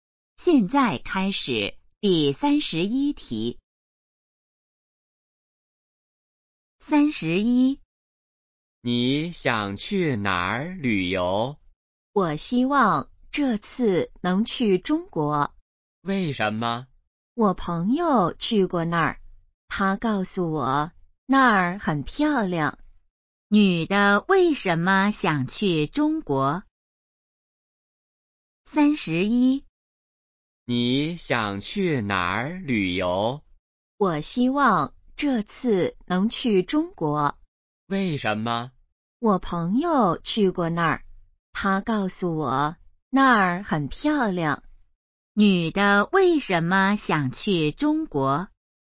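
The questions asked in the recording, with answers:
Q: 女的为什么想去中国?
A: 朋友说那儿很漂亮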